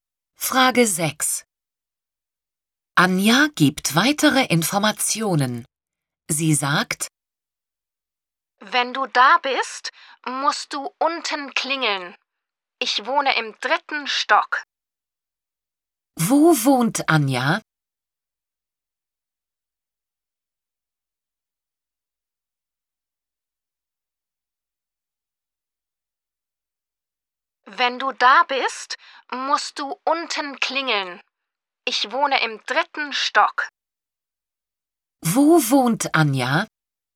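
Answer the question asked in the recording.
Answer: Im 3. Stock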